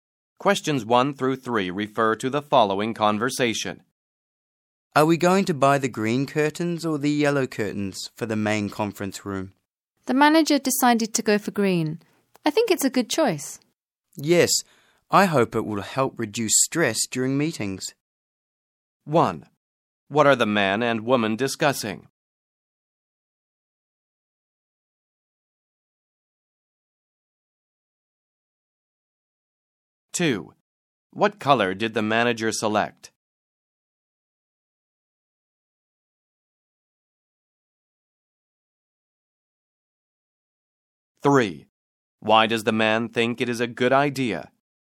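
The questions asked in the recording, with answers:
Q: What are the man and woman discussing?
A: Which color curtains to buy for the main conference room

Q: What color did the manager select?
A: Green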